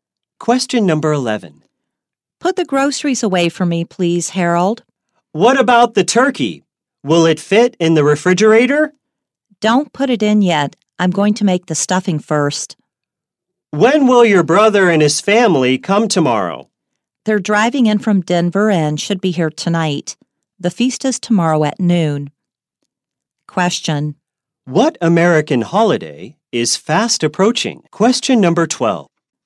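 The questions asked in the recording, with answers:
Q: What American holiday is fast approaching?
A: Thanksgiving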